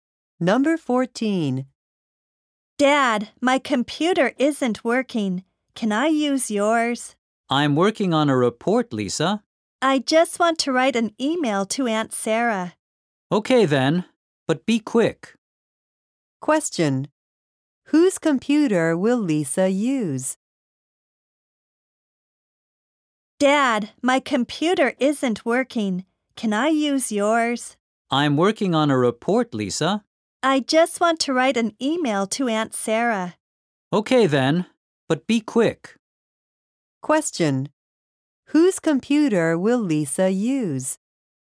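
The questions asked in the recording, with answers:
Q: Whose computer will Lisa use?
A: Her father's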